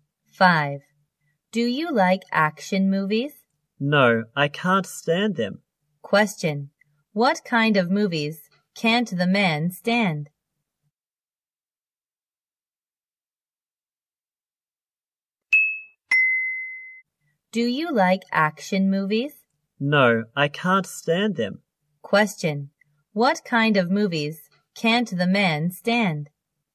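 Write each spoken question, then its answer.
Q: What kind of movies can't the man stand?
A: Action movies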